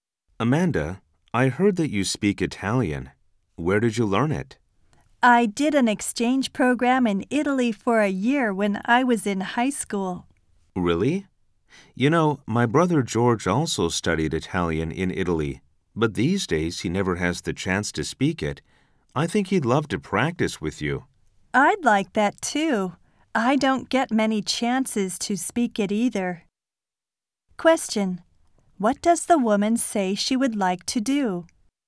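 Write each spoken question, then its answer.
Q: What does the woman say she would like to do?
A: Practice speaking Italian with the man's brother George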